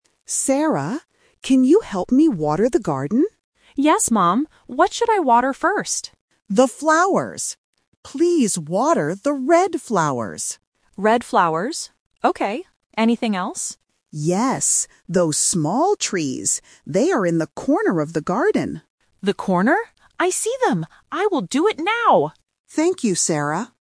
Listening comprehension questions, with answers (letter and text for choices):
Listen to the conversation and choose the correct answer (A, B, or C).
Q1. What color are the flowers Sarah needs to water?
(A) Blue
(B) Red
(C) Pink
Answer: (B) Red

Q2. What size are the trees?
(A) Small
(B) Big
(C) Tall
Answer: (A) Small

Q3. Where are the small trees?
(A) In the middle of the garden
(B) In the front of the garden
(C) In the corner of the garden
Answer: (C) In the corner of the garden

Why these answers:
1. The mother says "water the red flowers" to make it clear. Options (A) and (C) are not mentioned.
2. The mother specifically mentions "small trees". Options (B) and (C) are opposites or different adjectives not used in the script.
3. The mother says the trees are "in the corner" and the daughter repeats "The corner?" to confirm the location.

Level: A1